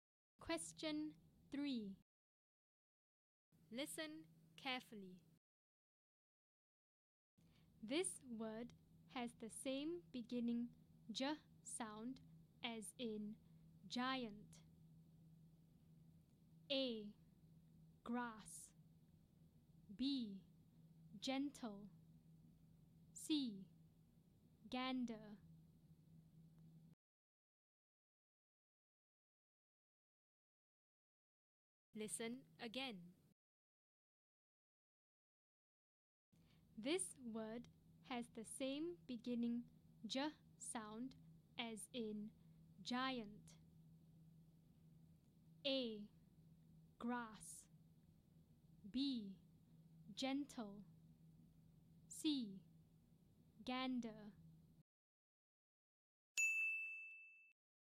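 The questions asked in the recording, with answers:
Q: This word has the same beginning J sound as in giant.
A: B: Gentle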